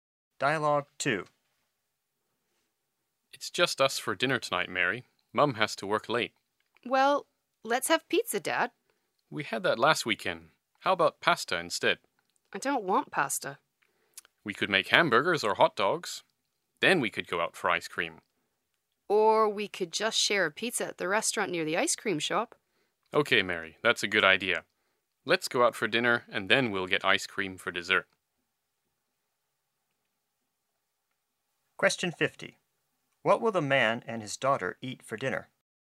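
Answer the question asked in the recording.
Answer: Pizza at a restaurant, then ice cream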